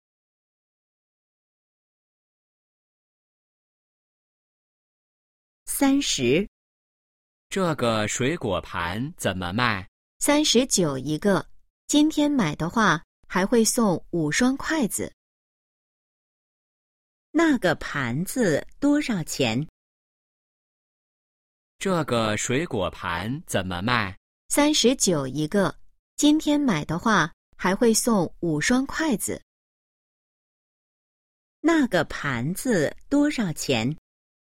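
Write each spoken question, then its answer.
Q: 那个盘子多少钱?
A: 39块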